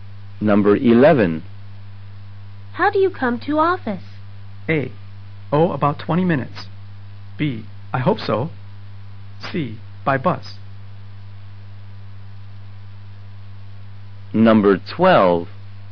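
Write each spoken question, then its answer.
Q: How do you come to office?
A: C: By bus.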